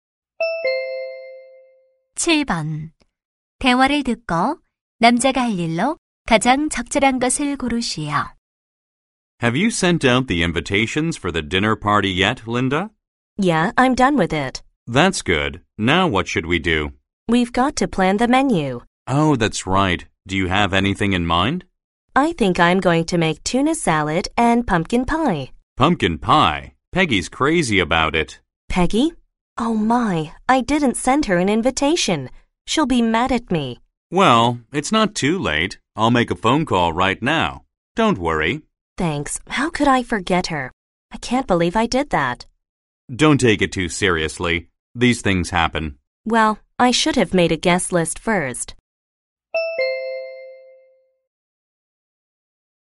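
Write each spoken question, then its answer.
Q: 대화를 듣고 남자가 할 일로 가장 적절한 것을 고르시오.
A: Peggy에게 전화해서 초대하기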